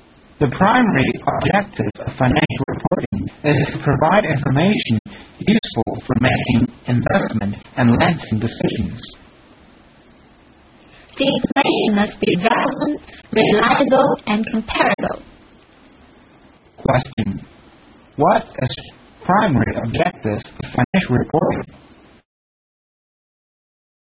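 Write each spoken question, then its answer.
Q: What is the primary objective of financial reporting?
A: To provide information useful for making investment and lending decisions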